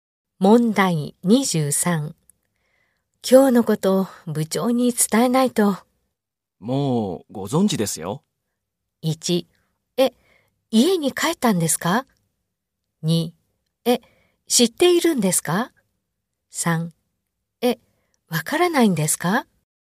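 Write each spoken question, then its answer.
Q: 今日のことを部長に伝えないと。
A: 2: え、知っているんですか?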